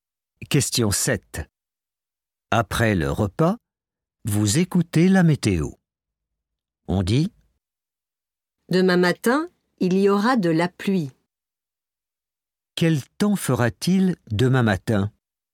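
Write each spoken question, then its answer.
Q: Quel temps fera-t-il demain matin ?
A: de la pluie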